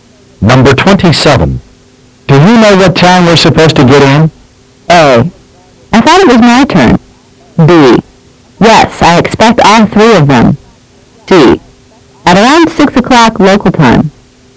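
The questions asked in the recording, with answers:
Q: Do you know what time we're supposed to get in?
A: C: At around 6 o'clock local time.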